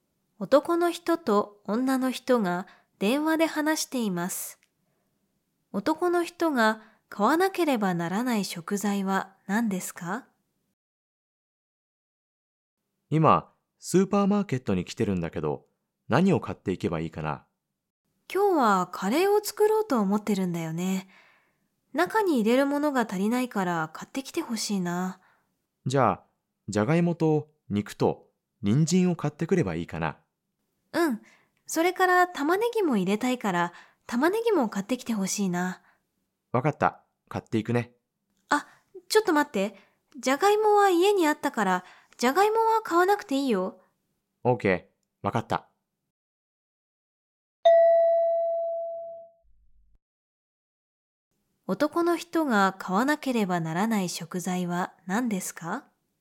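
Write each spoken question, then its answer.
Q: 男の人が買わなければならない食材は何ですか?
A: 肉と人参と玉ねぎ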